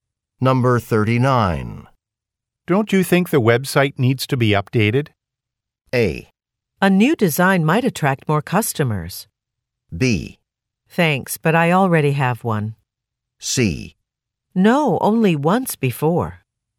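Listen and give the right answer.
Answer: A: A new design might attract more customers.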